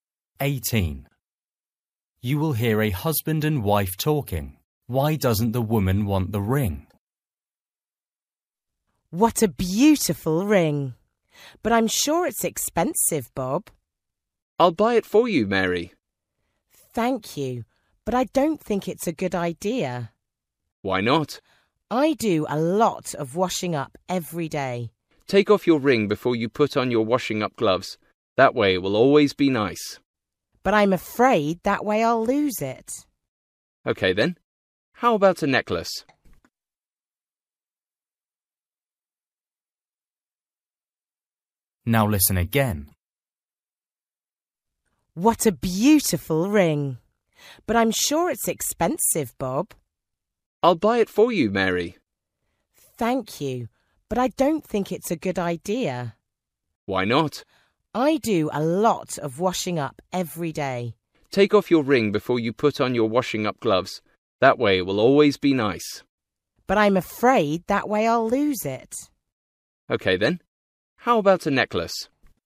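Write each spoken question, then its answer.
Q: Why doesn't the woman want the ring?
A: She's afraid she'll lose it when she takes it off to do the washing up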